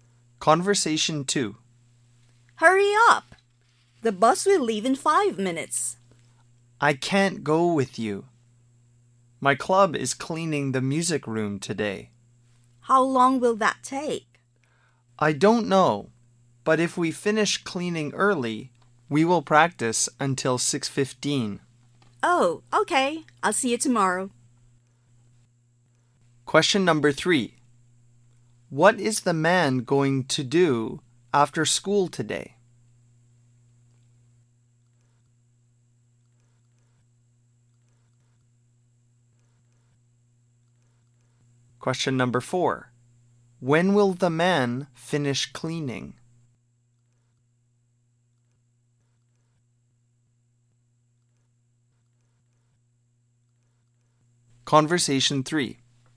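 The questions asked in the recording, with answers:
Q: What is the man going to do after school today?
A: Clean the music room with his club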